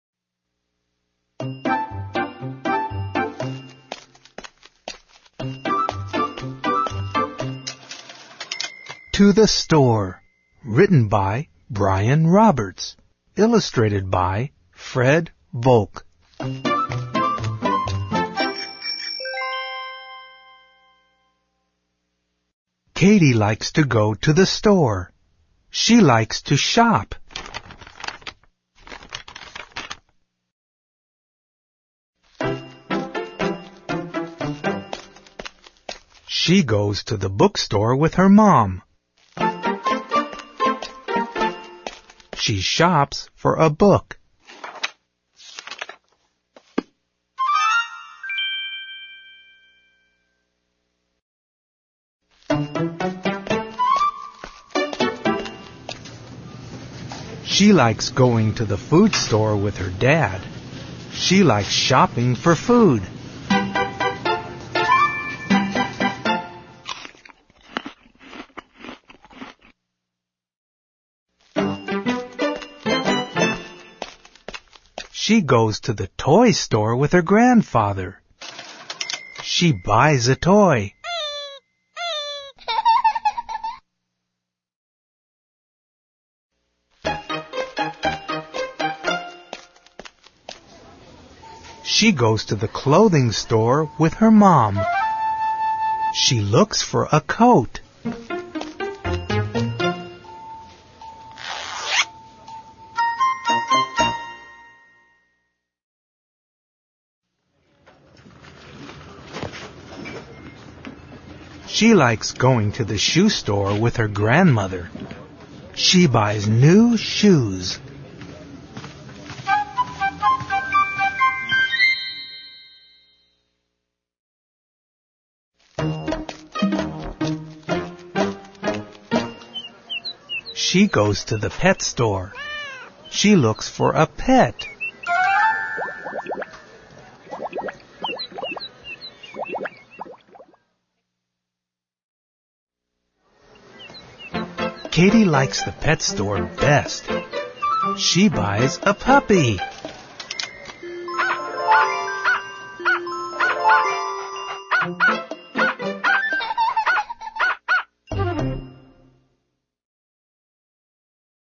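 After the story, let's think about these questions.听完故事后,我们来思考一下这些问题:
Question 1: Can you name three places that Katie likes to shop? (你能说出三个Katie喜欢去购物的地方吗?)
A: The bookstore, the food store and the pet store (also the toy store, clothing store and shoe store).

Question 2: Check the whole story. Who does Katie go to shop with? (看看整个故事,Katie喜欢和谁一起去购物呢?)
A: Her mom, her dad, her grandfather and her grandmother.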